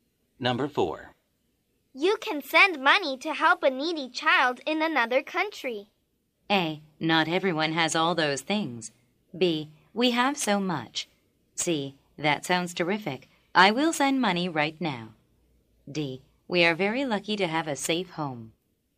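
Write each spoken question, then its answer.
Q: You can send money to help a needy child in another country.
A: C: That sounds terrific. I will send money right now.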